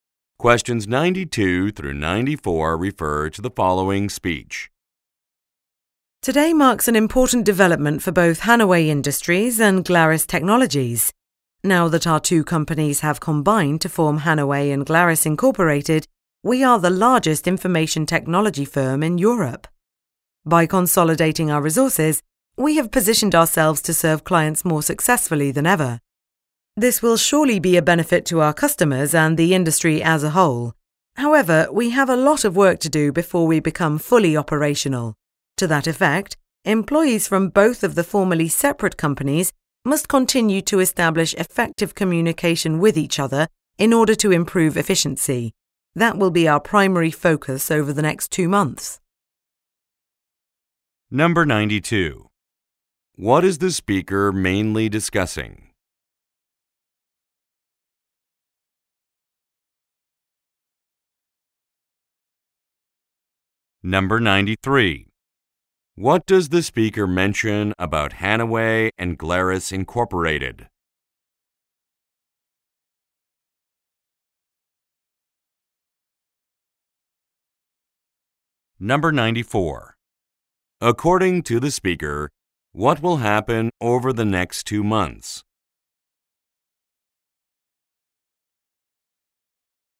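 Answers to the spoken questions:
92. The merger of two companies
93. It is the largest IT firm in Europe
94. Employees will work on communicating effectively with each other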